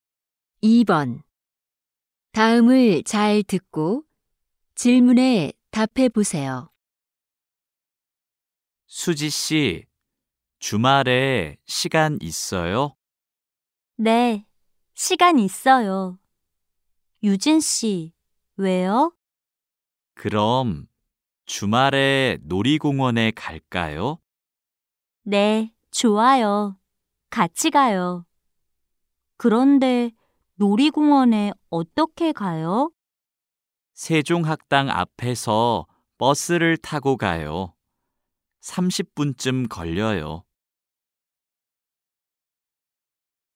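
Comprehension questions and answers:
[12-1~12-3] 다음을 잘 듣고 질문에 답해 보세요.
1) 유진 씨는 주말에 누구를 만나요?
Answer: 수지 씨

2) 놀이공원에 무엇을 타고 가요?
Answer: 버스

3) 얼마나 걸려요?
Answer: 30분쯤

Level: 1B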